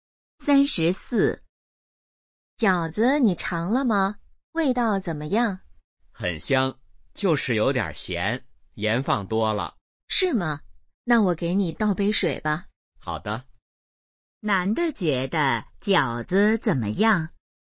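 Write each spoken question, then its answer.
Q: 男的觉得饺子怎么样?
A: 有点咸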